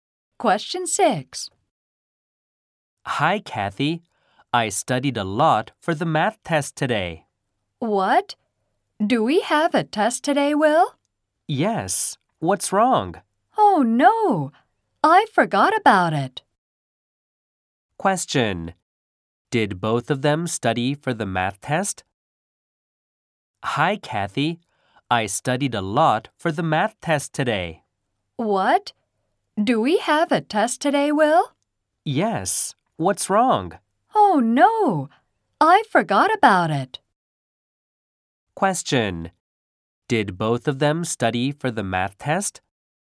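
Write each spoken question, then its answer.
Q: Did both of them study for the math test?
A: No, only Will did.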